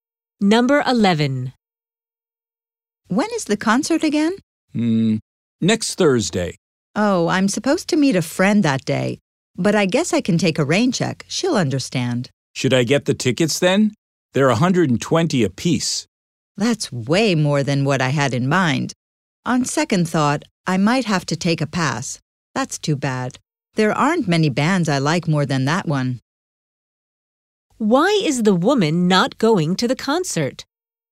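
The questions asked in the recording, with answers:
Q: Why is the woman not going to the concert?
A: The tickets are too expensive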